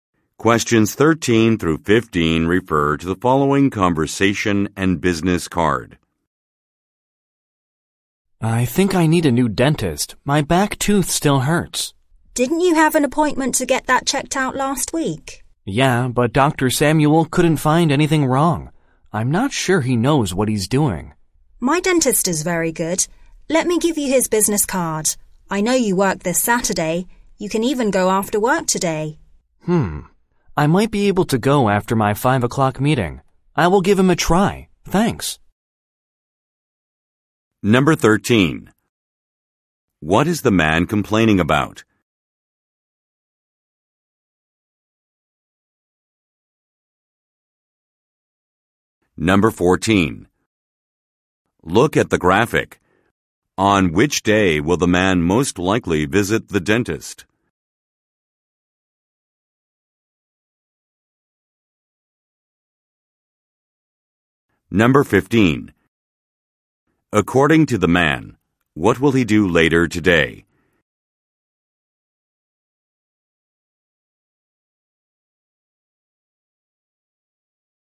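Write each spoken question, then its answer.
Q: What is the man complaining about?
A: His back tooth still hurts

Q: According to the man, what will he do later today?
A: Attend a 5 o'clock meeting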